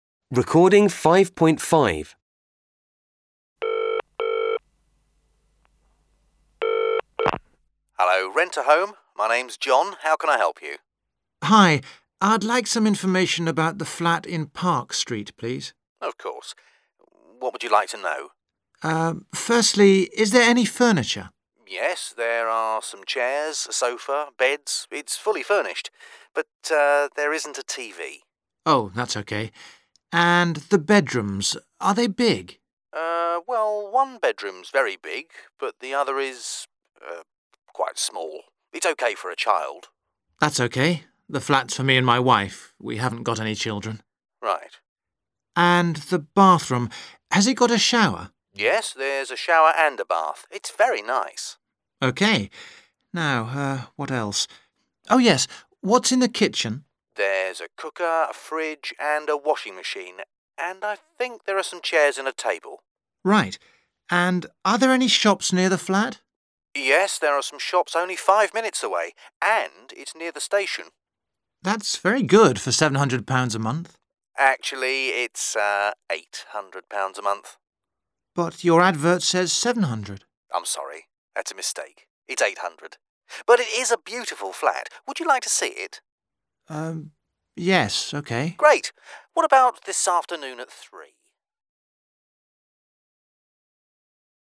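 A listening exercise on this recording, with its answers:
Choose the correct answer (use headphones):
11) There's some furniture in the flat.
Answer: True

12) The estate agents says that both bedrooms are big.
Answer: False

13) Alex doesn't have any children .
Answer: True

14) There aren't any shops near the flat.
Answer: False

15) Alex wants to see the flat.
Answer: True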